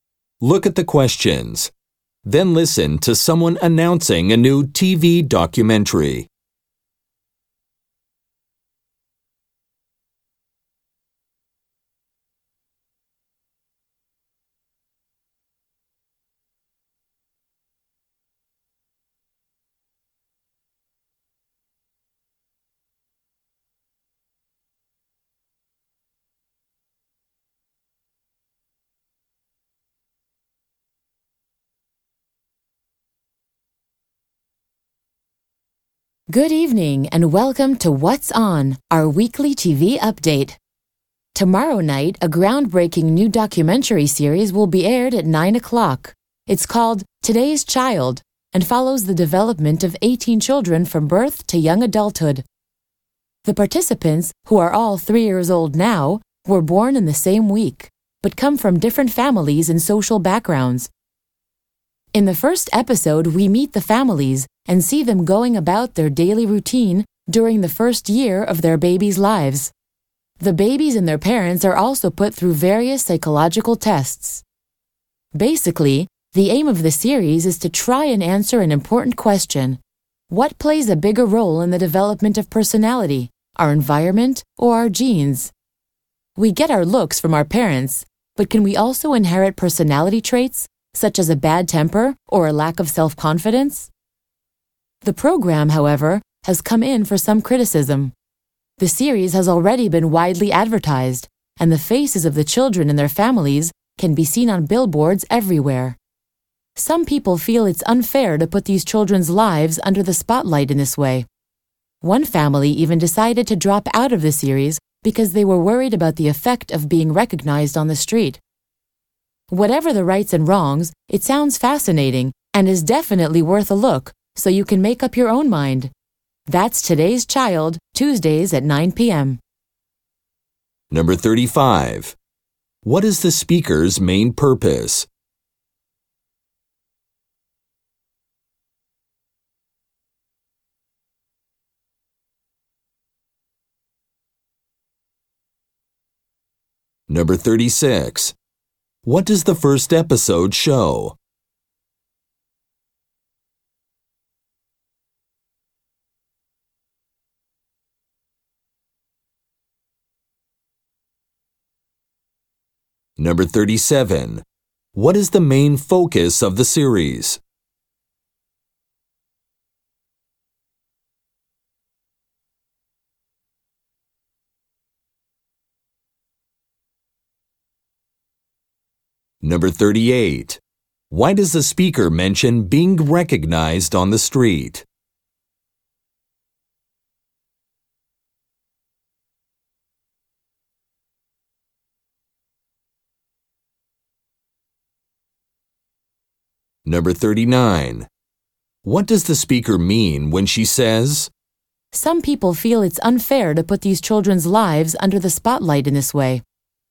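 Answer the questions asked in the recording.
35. To promote a new TV documentary series
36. The families' daily routines in the babies' first year
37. Whether environment or genes matter more for personality
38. It is why one family dropped out of the series
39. Some think the children's privacy is being invaded by too much publicity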